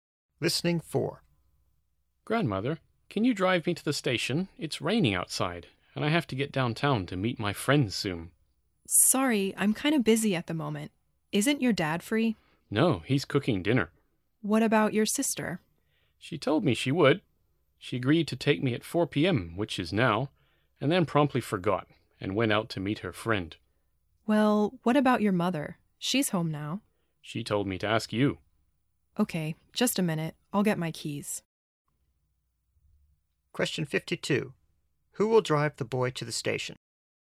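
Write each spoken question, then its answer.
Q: Who will drive the boy to the station?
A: His grandmother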